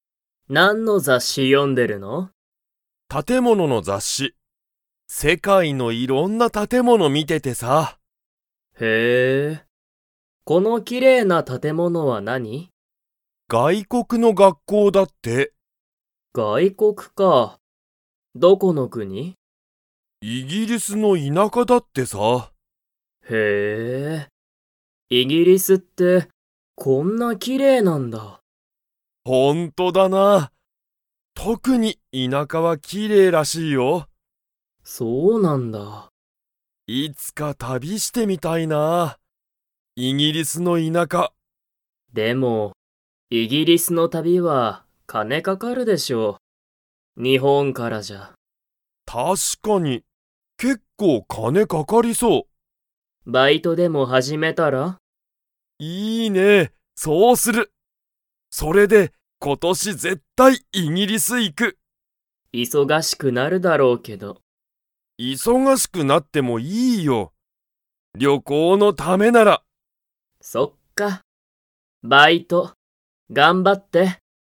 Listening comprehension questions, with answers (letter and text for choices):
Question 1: 特とくに、イギリスの はきれいらしい。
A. 田舎いなか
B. 旅たび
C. バイト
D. 外国がいこく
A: A. 田舎いなか

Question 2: シュウは、忙いそがしくなってもいいと思おもっていますか?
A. はい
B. いいえ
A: A. はい

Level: Level 4